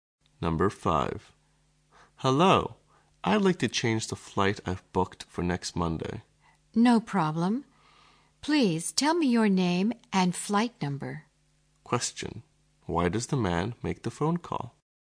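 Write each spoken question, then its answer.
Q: Why does the man make the phone call?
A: To change his flight booked for next Monday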